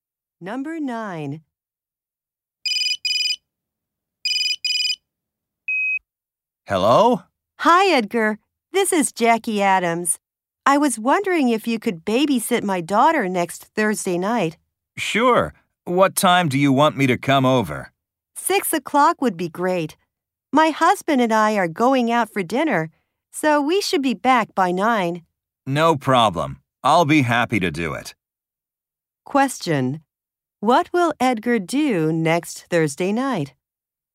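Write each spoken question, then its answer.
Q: What will Edgar do next Thursday night?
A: Babysit Jackie's daughter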